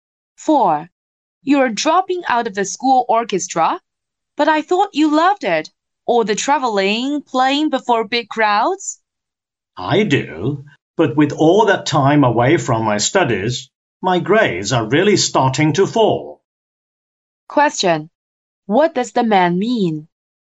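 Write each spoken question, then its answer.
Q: What does the man mean?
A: He is leaving the orchestra because his grades are falling.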